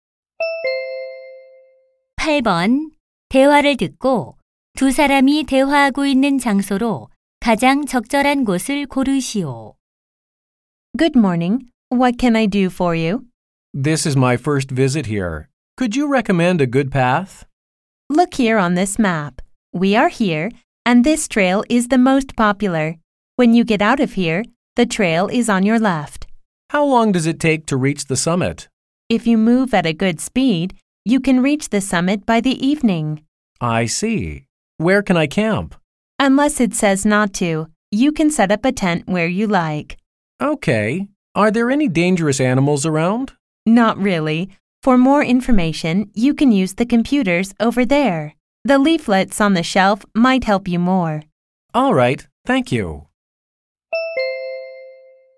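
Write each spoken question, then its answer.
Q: 대화를 듣고 두 사람이 대화하고 있는 장소로 가장 적절한 곳을 고르시오.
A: 산 탐방 안내소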